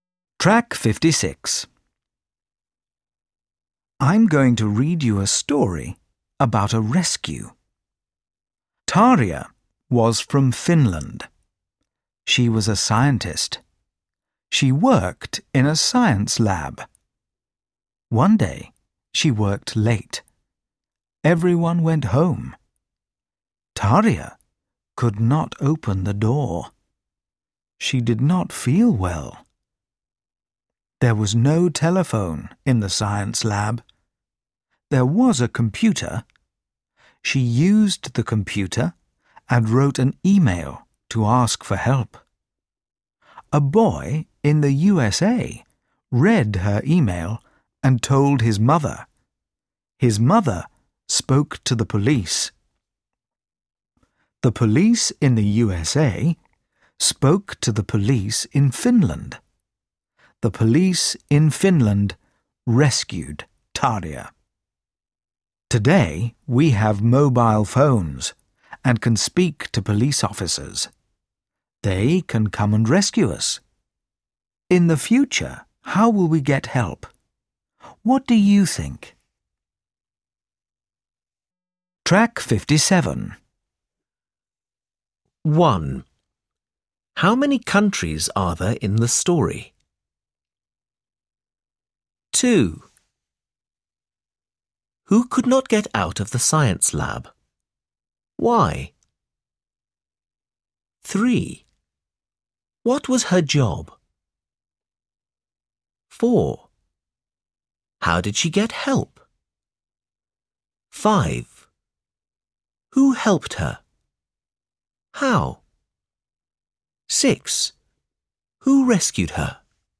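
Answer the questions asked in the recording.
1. Two (Finland and the USA)
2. Tarja
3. She was a scientist
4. She used the computer and wrote an email
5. A boy in the USA read her email and told his mother, who spoke to the police
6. The police in Finland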